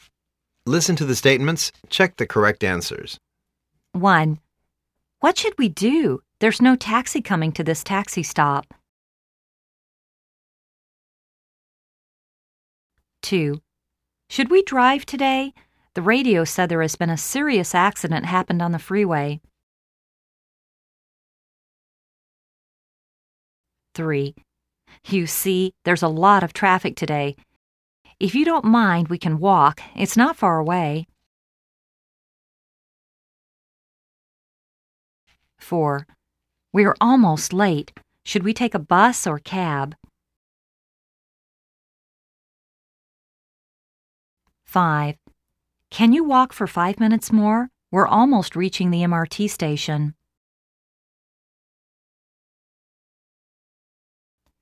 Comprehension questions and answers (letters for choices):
Listen to the statements.Check the correct answers.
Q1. What should we do? There's no taxi coming to this taxi stop...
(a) Let's call a taxi.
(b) Let's talk to the police officer.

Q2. Should we drive today? The radio said there has been a serious accident happened on the freeway.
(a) Let's take a taxi.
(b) Let's take the MRT.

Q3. You see, there's a lot of traffic today. If you don't mind we can walk, it's not far away.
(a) Ok, let's take a bus.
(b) Ok. Sounds like a good idea.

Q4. We're almost late. Should we take a bus or cab?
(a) Take a bus, it's quicker.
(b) Take a cab, it's quicker.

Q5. Can you walk for 5 minutes more? We are almost reaching the MRT station.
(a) Sure, no more than 5 minutes.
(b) Sure. I can't walk anymore.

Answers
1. a
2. b
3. b
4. b
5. a